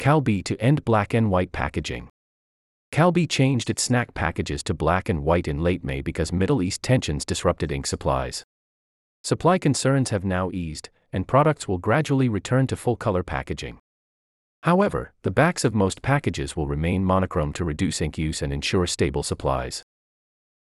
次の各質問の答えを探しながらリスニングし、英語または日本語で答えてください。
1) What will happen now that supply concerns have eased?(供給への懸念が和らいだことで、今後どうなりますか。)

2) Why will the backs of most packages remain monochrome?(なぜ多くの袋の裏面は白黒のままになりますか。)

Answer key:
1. Products will gradually return to full-color packaging.
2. To reduce ink use and ensure stable supplies.

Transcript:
Calbee to End Black-and-White Packaging
Calbee changed its snack packages to black and white in late May because Middle East tensions disrupted ink supplies.
Supply concerns have now eased, and products will gradually return to full-color packaging.
However, the backs of most packages will remain monochrome to reduce ink use and ensure stable supplies.